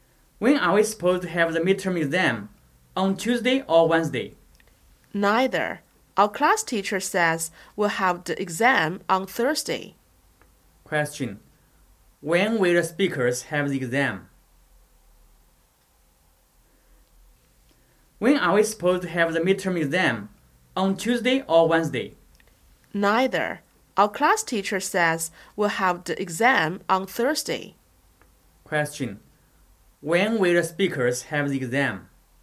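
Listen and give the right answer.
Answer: On Thursday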